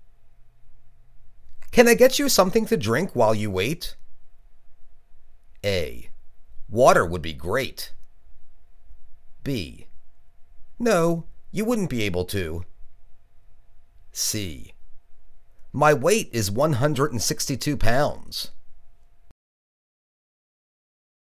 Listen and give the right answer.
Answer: Water would be great.